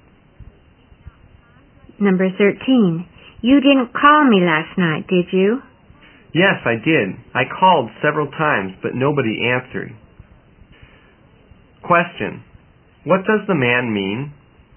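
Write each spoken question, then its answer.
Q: what does the man mean?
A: He called several times but nobody answered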